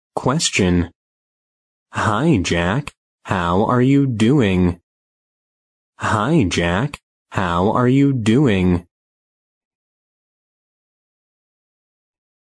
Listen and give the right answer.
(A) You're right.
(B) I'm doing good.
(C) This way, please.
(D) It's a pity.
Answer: (B) I'm doing good.

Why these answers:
句子意为"嗨,杰克。你好吗?",B项I'm doing good(我很好)符合题意。 A项You're right(你是对的)用来表达"赞成和肯定"。C项This way,please(这边请)常用于服务场合,引导或邀请对方跟随自己。D项It's a pity(很遗憾)常用来表达对失去机会、无法达到预期结果等各种不尽如人意事件的惋惜。

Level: B级